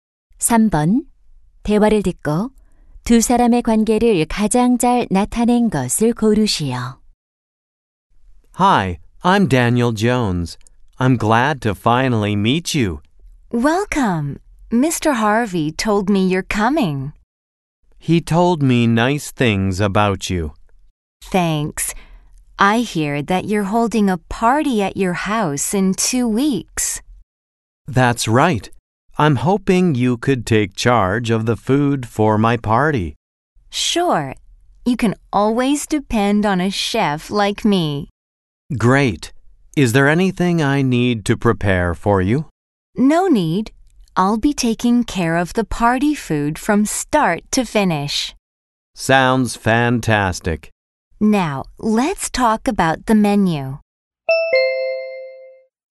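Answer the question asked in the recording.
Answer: 파티 주최자 - 요리사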